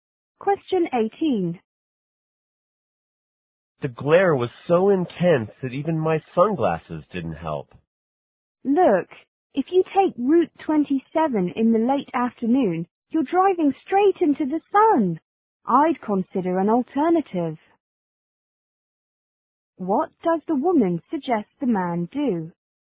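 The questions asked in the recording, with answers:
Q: What does the woman suggest the man do?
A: Take a different route.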